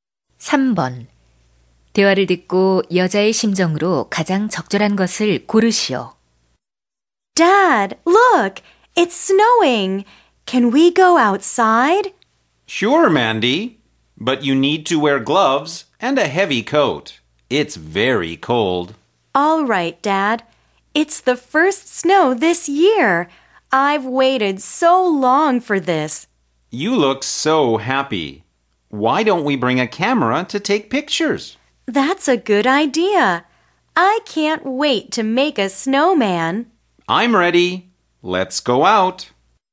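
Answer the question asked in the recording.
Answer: 신남/기쁨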